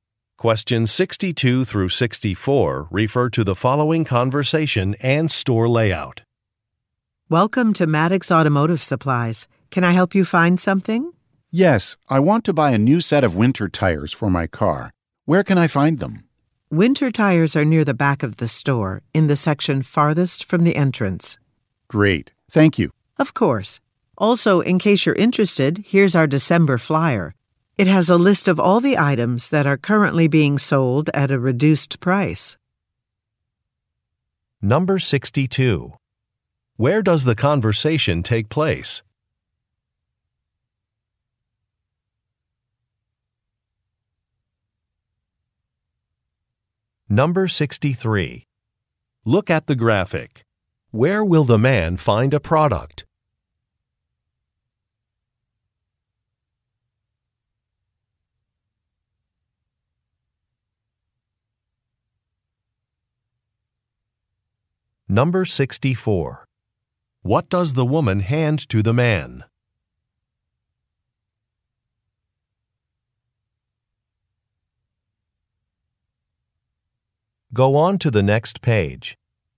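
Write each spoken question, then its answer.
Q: Where does the conversation take place?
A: At an automotive supply store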